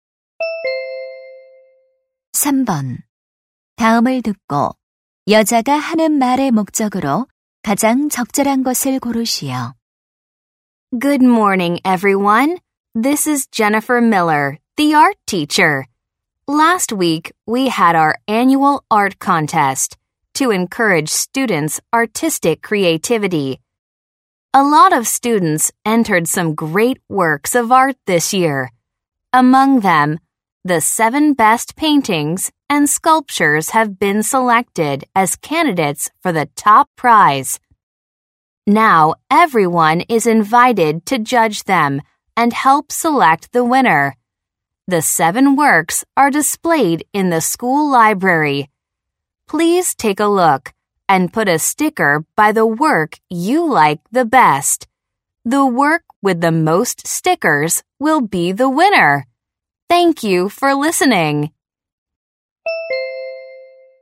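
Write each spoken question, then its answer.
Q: 다음을 듣고 여자가 하는 말의 목적으로 가장 적절한 것을 고르시오.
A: 미술 대회 우승작 선정 투표 참여를 요청하려고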